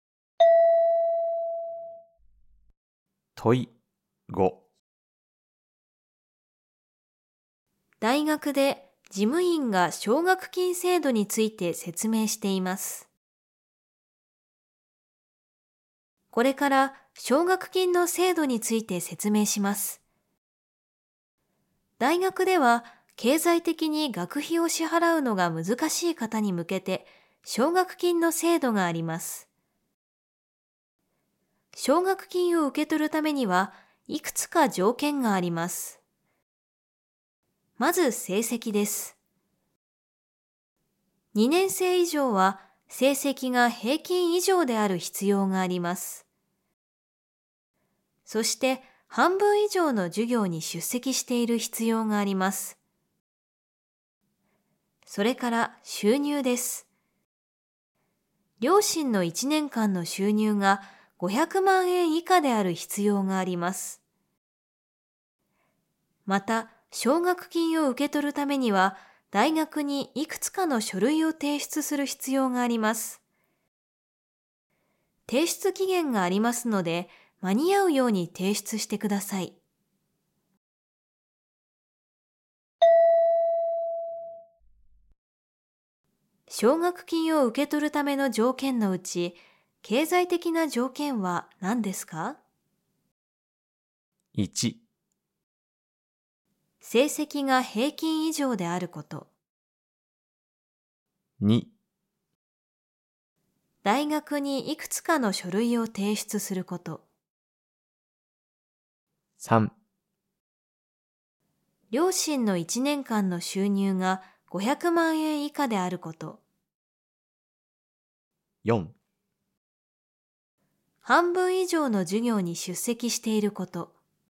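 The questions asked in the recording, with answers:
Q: 奨学金を受け取るための条件のうち、経済的な条件は何ですか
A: 3: 両親の1年間の収入が500万円以下であること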